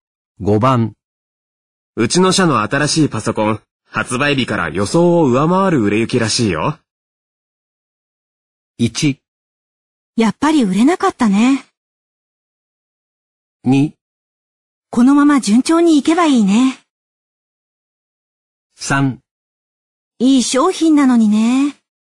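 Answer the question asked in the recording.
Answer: 2: このまま順調にいけばいいね。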